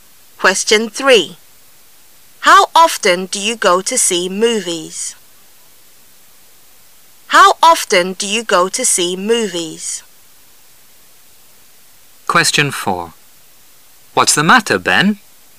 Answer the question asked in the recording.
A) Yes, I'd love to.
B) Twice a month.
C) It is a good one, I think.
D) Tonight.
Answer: B) Twice a month.

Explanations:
本题应抓住关键疑问词how often,该词是用来询问频率的。故答案为[B]Twice a month"每月两次"。其它悬想都是答非所问。